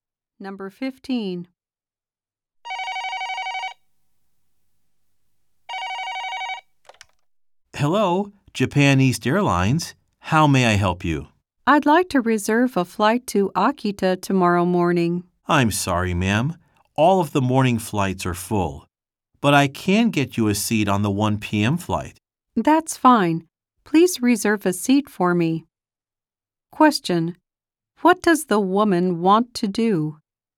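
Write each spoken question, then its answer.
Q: What does the woman want to do?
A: Reserve a flight to Akita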